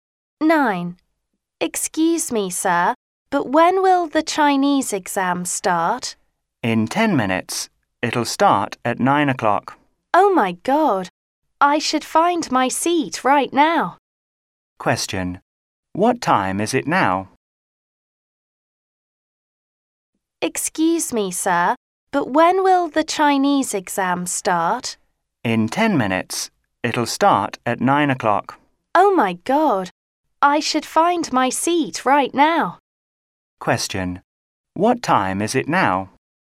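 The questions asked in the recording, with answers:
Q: Question: What time is it now?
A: 8:50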